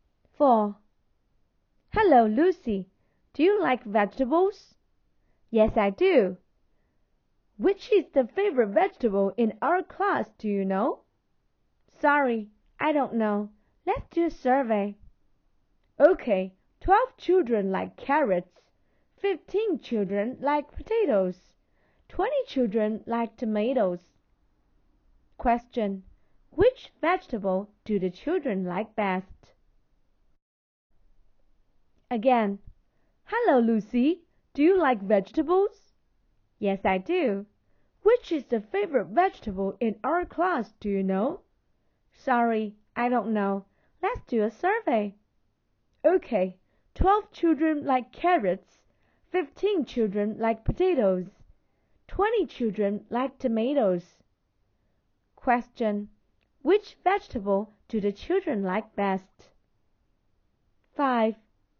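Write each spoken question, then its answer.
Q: which vegetable do the children like best?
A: Tomatoes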